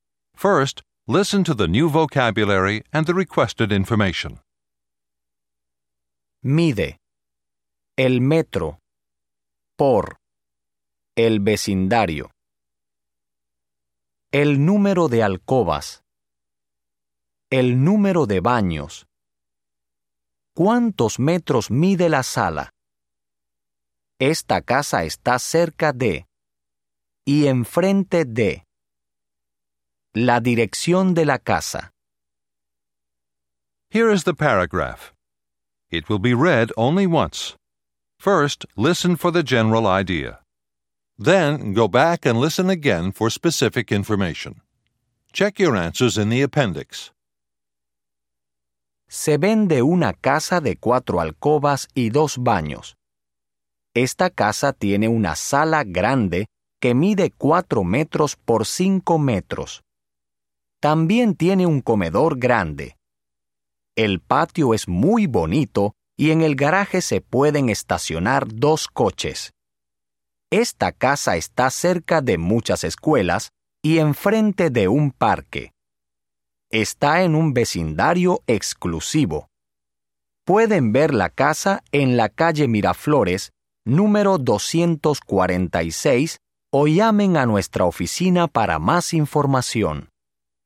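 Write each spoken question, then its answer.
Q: ¿Cuántos metros mide la sala?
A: 4 metros por 5 metros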